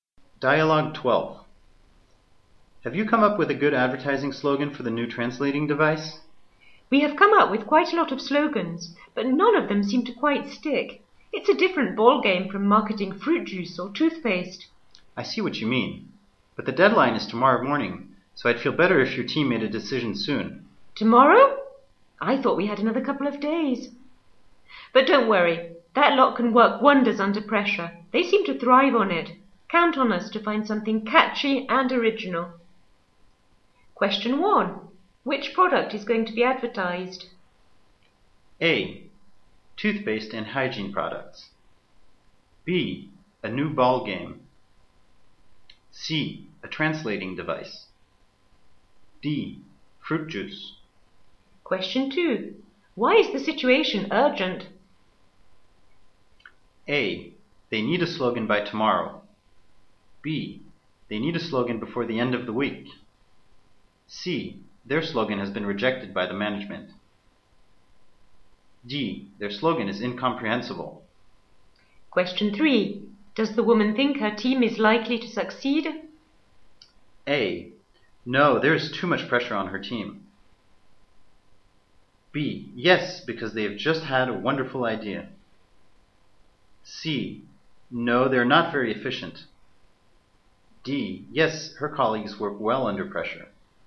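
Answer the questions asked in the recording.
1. C: A translating device.
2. A: They need a slogan by tomorrow.
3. D: Yes, her colleagues work well under pressure.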